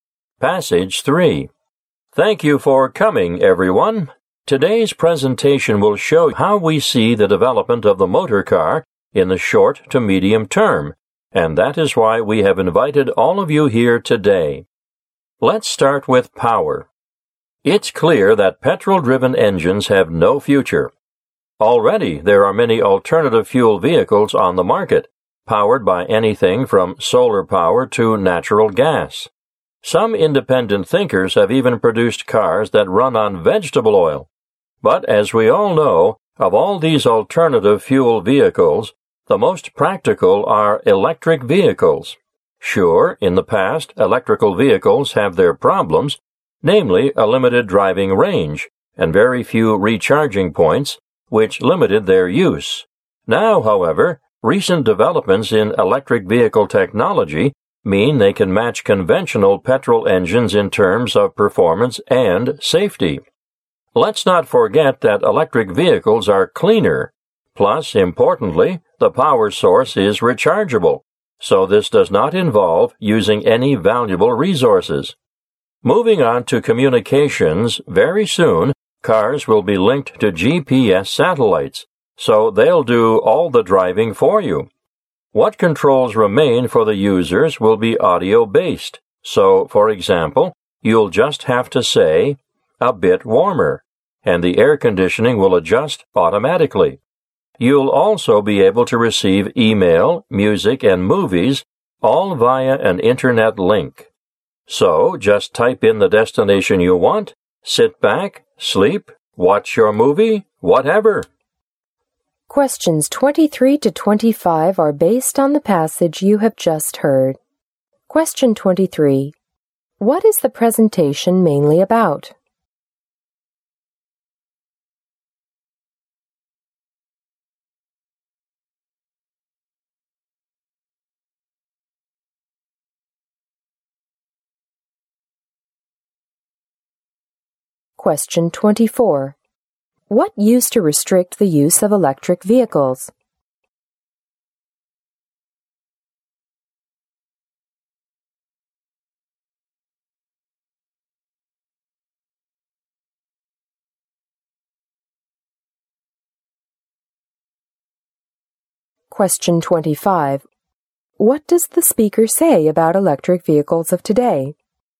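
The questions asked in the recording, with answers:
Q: What is the presentation mainly about?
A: How the motor car will develop in the short to medium term.

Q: What used to restrict the use of electric vehicles?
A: A limited driving range and very few recharging points.

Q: What does the speaker say about electric vehicles of today?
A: They can match petrol engines in performance and safety.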